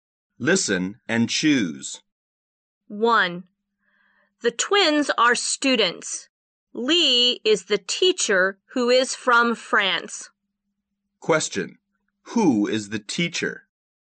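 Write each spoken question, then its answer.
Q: Who is the teacher?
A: Lee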